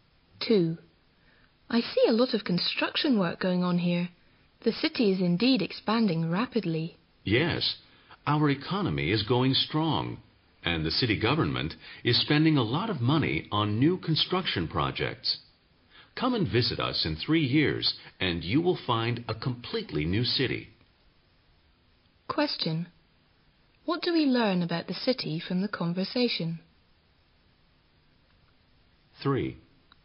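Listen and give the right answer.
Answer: It is expanding rapidly with much new construction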